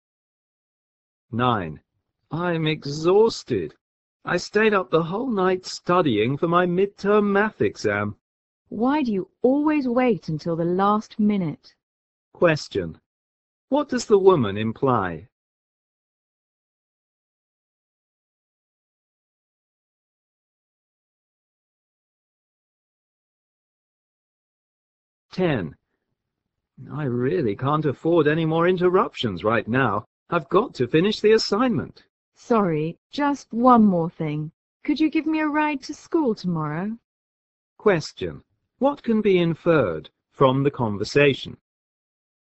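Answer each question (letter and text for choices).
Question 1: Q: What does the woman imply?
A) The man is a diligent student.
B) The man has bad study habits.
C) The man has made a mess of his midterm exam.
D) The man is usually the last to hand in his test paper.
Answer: B) The man has bad study habits.

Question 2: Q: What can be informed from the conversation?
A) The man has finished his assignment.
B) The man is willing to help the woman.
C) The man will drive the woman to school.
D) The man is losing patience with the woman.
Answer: D) The man is losing patience with the woman.

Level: 大学英语四级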